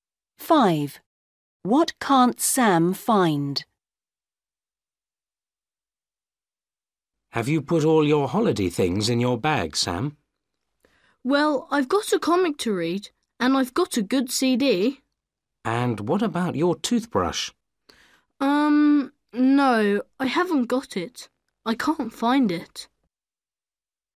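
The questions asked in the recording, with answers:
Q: What can't Sam find?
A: His toothbrush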